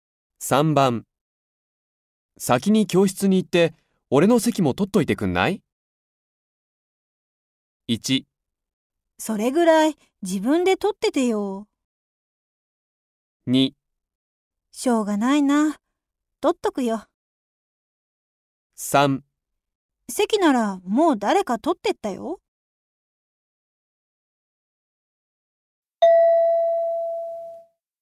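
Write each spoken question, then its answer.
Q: 先に教室に行って、俺の席も取っといてくんない?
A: 2: しょうがないな。取っとくよ。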